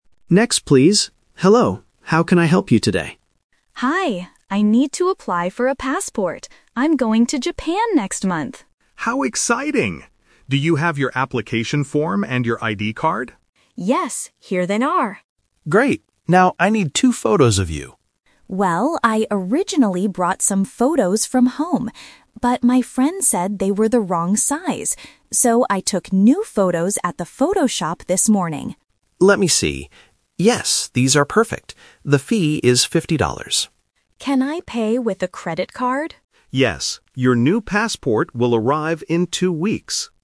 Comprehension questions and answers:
Listen to a conversation between a clerk and a customer. For each question, choose the correct answer (A, B, or C).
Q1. Why is the woman talking to the clerk?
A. To book a flight to Japan.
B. To get a new ID card.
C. To apply for a passport.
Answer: To apply for a passport.

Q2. Where did the woman get the photos she gives to the clerk?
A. From her home.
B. From her friend.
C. From a photo shop.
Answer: From a photo shop.

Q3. When will she receive her passport?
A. This morning.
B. In two weeks.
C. Next month.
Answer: In two weeks.

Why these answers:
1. At the beginning, Emma clearly says, "I need to apply for a passport" (Option C - Key). Option A is a trap because she mentions going to Japan, but she is not booking a flight. Option B is also a trap because the clerk asks for her ID card, but she is not applying for a new one.
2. Emma says she "originally brought some photos from home" (Option A - Trap). However, they were the wrong size. Therefore, she "took new photos at the photo shop this morning" and gave those to the clerk (Option C - Key). Option B is wrong because her friend only gave her advice, not the photos.
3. At the end of the conversation, the clerk says, "Your new passport will arrive in two weeks" (Option B - Key). Option A is a trap because "this morning" is when she took the photos. Option C is a trap because "next month" is when she will travel to Japan.

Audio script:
Clerk: Next, please! Hello, how can I help you today?
Emma: Hi. I need to apply for a passport. I'm going to Japan next month!
Clerk: How exciting! Do you have your application form and your ID card?
Emma: Yes, here they are.
Clerk: Great. Now, I need two photos of you.
Emma: Well, I originally brought some photos from home. But my friend said they were the wrong size. So, I took new photos at the photo shop this morning.
Clerk: Let me see. Yes, these are perfect. The fee is 50 dollars.
Emma: Can I pay with a credit card?

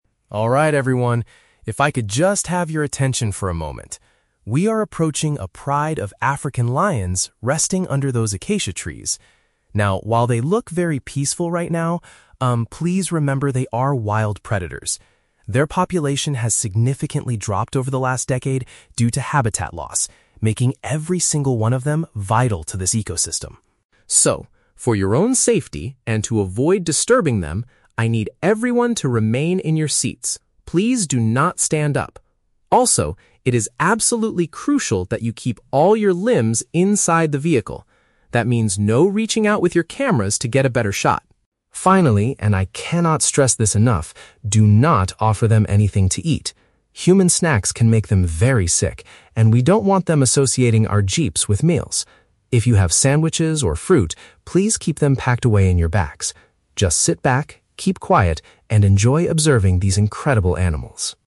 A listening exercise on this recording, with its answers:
Listen to a tour guide giving instructions on a safari vehicle and choose the best answer (A, B, or C) for each question.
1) What does the guide instruct the passengers to do while observing the animals?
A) Stand up quickly to take a good picture of the lions.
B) Stay sitting down and keep their arms inside the truck.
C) Move to the center of the vehicle for better protection.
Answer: Stay sitting down and keep their arms inside the truck.

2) What has caused the number of these lions to decrease over the years?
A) The destruction of their natural living areas.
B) The lack of wild animals for them to hunt.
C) The diseases they catch from other predators.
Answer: The destruction of their natural living areas.

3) Why does the speaker tell the tourists to keep their food hidden?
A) Because eating in the vehicle will attract unwanted insects.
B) Because the safari company will provide a meal later.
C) Because human food can cause the lions to have health issues.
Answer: Because human food can cause the lions to have health issues.

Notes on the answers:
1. The guide tells the passengers to "remain in your seats" and "keep all your limbs inside the vehicle". Option B paraphrases this as "stay sitting down" and "keep their arms inside".
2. The guide mentions that their population dropped due to "habitat loss". Option A paraphrases this as "the destruction of their natural living areas".
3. The guide warns that "Human snacks can make them very sick". Option C paraphrases this as causing "health issues".

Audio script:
Tour Guide: Alright, everyone, if I could just have your attention for a moment. We are approaching a pride of African lions resting under those acacia trees. Now, while they look very peaceful right now, um, please remember they are wild predators. Their population has significantly dropped over the last decade due to habitat loss, making every single one of them vital to this ecosystem.
So, for your own safety and to avoid disturbing them, I need everyone to remain in your seats. Please do not stand up. Also, it is absolutely crucial that you keep all your limbs inside the vehicle. That means no reaching out with your cameras to get a better shot.
Finally, and I cannot stress this enough, do not offer them anything to eat. Human snacks can make them very sick, and we don't want them associating our jeeps with meals. If you have sandwiches or fruit, please keep them packed away in your bags. Just sit back, keep quiet, and enjoy observing these incredible animals.

